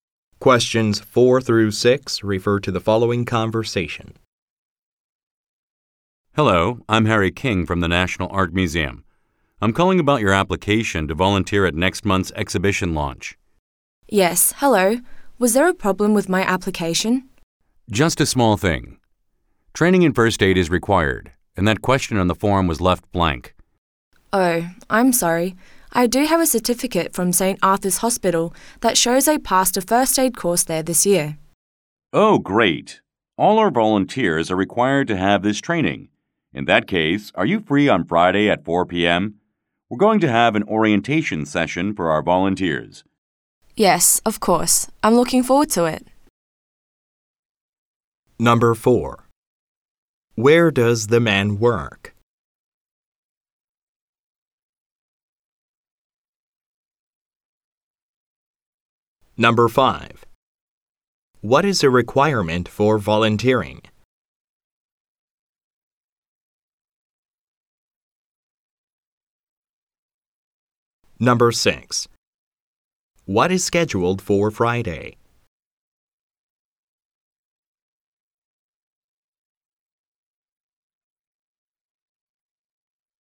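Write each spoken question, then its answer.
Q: Where does the man work?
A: At the National Art Museum

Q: What is a requirement for volunteering?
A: First aid training

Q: What is scheduled for Friday?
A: An orientation session for volunteers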